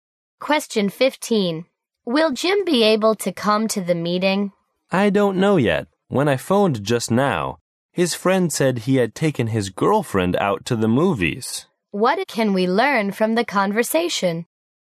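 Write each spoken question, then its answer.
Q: What can we learn from the conversation?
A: Jim has taken his girlfriend to the movies, so it's unclear if he'll come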